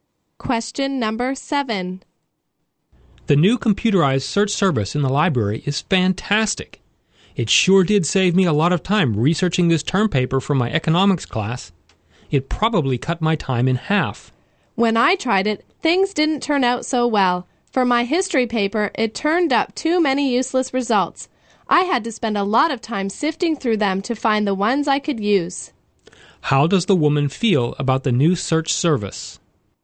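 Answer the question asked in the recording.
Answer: She was not happy with it, because it gave her too many useless results.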